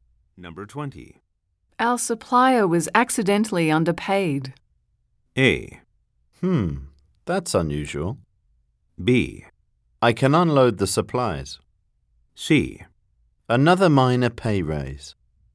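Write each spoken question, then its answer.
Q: Our supplier was accidentally underpaid.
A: A: That's unusual.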